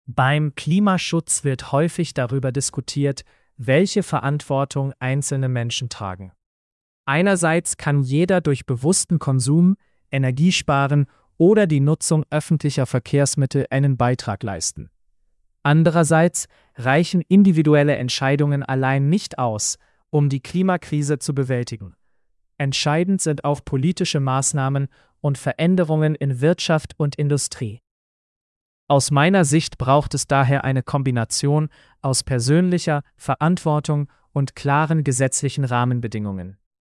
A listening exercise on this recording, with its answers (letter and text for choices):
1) Was können einzelne Menschen laut Text tun?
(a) Bewusst konsumieren, Energie sparen und öffentliche Verkehrsmittel nutzen.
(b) Nur auf politische Entscheidungen warten.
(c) Die Industrie allein verändern.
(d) Keine Verantwortung übernehmen.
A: (a) Bewusst konsumieren, Energie sparen und öffentliche Verkehrsmittel nutzen.

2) Was reicht laut Text nicht aus?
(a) Politische Maßnahmen.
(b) Individuelle Entscheidungen allein.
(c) Gesetzliche Rahmenbedingungen.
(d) Veränderungen in der Industrie.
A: (b) Individuelle Entscheidungen allein.

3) Welche Meinung vertritt die sprechende Person?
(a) Nur einzelne Menschen sind verantwortlich.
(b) Nur Unternehmen sind verantwortlich.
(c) Es braucht persönliche Verantwortung und politische Regeln.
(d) Klimaschutz ist unwichtig.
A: (c) Es braucht persönliche Verantwortung und politische Regeln.

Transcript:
Beim Klimaschutz wird häufig darüber diskutiert, welche Verantwortung einzelne Menschen tragen. Einerseits kann jeder durch bewussten Konsum, Energiesparen oder die Nutzung öffentlicher Verkehrsmittel einen Beitrag leisten. Andererseits reichen individuelle Entscheidungen allein nicht aus, um die Klimakrise zu bewältigen. Entscheidend sind auch politische Maßnahmen und Veränderungen in Wirtschaft und Industrie. Aus meiner Sicht braucht es daher eine Kombination aus persönlicher Verantwortung und klaren gesetzlichen Rahmenbedingungen.

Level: C1-Niveau